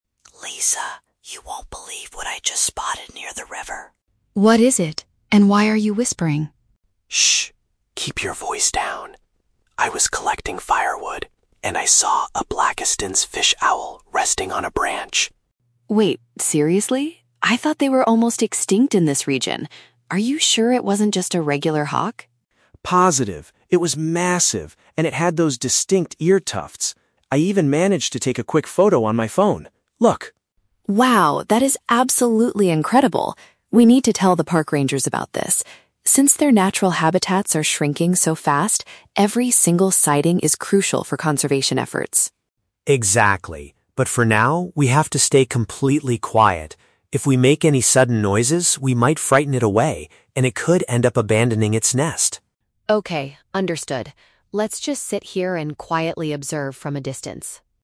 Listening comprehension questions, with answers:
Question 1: What was Tom doing when he first noticed the rare bird?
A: He was gathering wood for a fire.

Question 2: Why does Tom ask Lisa to lower her voice?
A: Because making loud sounds could scare the owl away.

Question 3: What do the two friends plan to do with this information later?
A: They will report the sighting to the local authorities.

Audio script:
Tom: Lisa, you won't believe what I just spotted near the river!
Lisa: What is it? And why are you whispering?
Tom: Shh! Keep your voice down. I was collecting firewood, and I saw a Blakiston's fish owl resting on a branch.
Lisa: Wait, seriously? I thought they were almost extinct in this region. Are you sure it wasn't just a regular hawk?
Tom: Positive. It was massive, and it had those distinct ear tufts. I even managed to take a quick photo on my phone. Look.
Lisa: Wow, that is absolutely incredible! We need to tell the park rangers about this. Since their natural habitats are shrinking so fast, every single sighting is crucial for conservation efforts.
Tom: Exactly. But for now, we have to stay completely quiet. If we make any sudden noises, we might frighten it away, and it could end up abandoning its nest.
Lisa: Okay, understood. Let's just sit here and quietly observe from a distance.